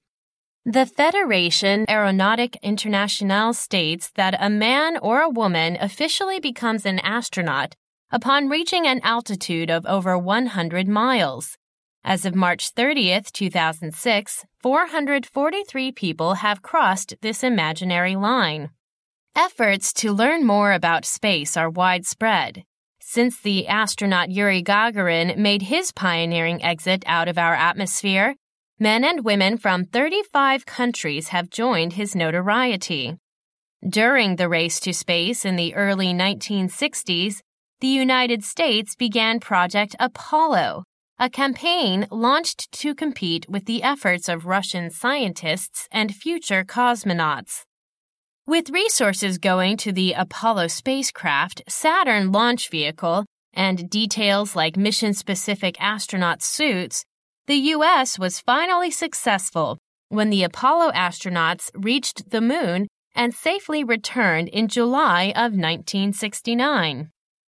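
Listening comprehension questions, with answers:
You will hear a recording. Type the missing words in each blank.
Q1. The Federation Aeronautique Internationale states that a man or woman (1) ............................ becomes an astronaut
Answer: officially

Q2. becomes an astronaut upon reaching an (2) ...................... of over 100 miles.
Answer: altitude

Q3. Since the astronaut Yuri Gagarin made his (3) ............................ exit out of our atmosphere,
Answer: pioneering

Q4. The United States began Project Apollo, a campaign (4) ....................... to compete with the efforts of Russian scientists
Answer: launched

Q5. to compete with the efforts of Russian scientists and future (5) ..........................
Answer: cosmonauts

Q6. With (6) ........................... going into the Apollo spacecraft,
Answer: resources

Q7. the U.S. was finally successful when the Apollo astronauts reached the moon and safely (7) ......................... 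in July of 1969.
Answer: returned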